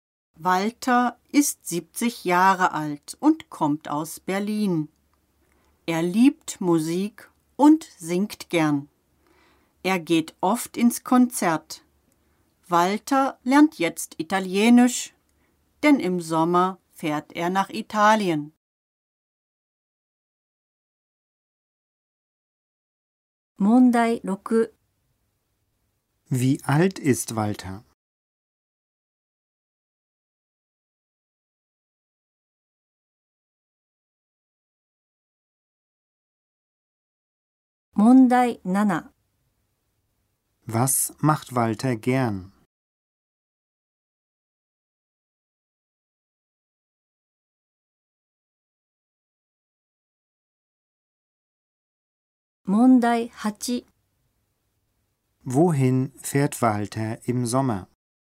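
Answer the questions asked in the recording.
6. 70 Jahre alt
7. Er singt gern.
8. Nach Italien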